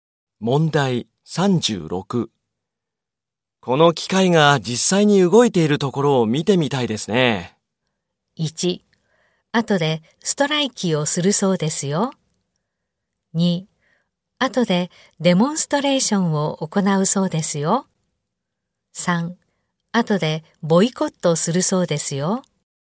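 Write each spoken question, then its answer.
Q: この機械が実際に動いているところを見てみたいですね。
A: 2: 後でデモンストレーションを行うそうですよ。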